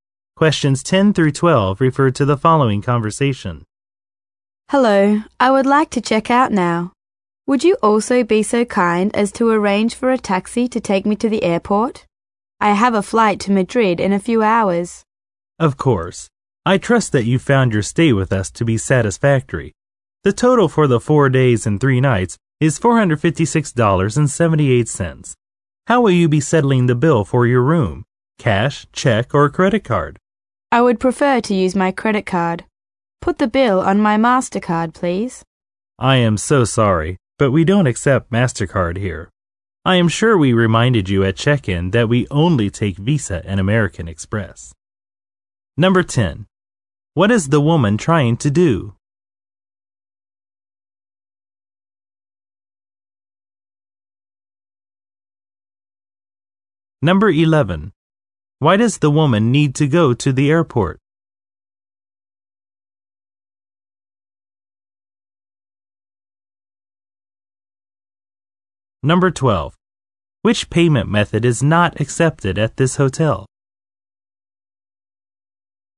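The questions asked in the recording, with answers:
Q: What is the woman trying to do?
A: Check out of the hotel

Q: Why does the woman need to go to the airport?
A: She has a flight to Madrid

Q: Which payment method is not accepted at this hotel?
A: MasterCard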